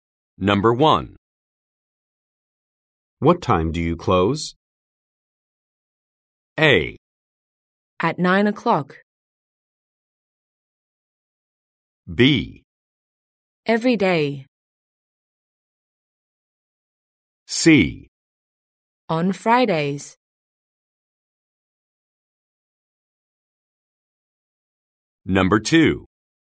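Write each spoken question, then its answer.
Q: What time do you close?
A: A: At 9 o'clock.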